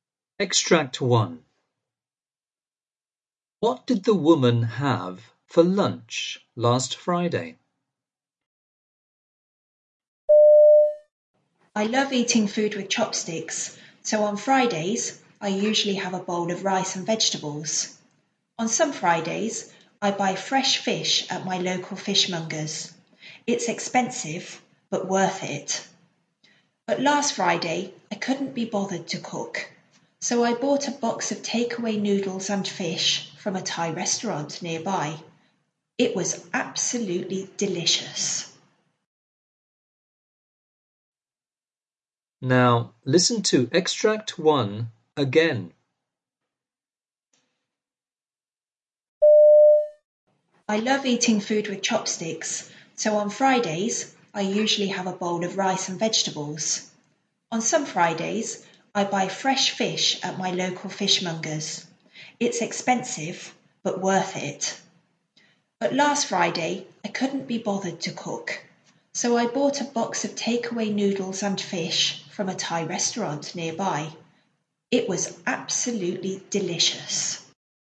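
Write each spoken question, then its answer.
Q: What did the woman have for lunch last Friday?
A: Takeaway noodles and fish from a Thai restaurant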